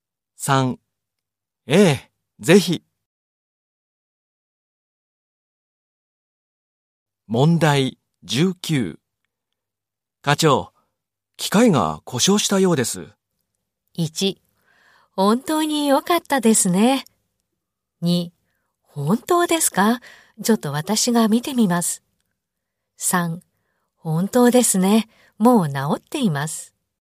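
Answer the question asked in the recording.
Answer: 2: 本当ですか?ちょっと私が見てみます。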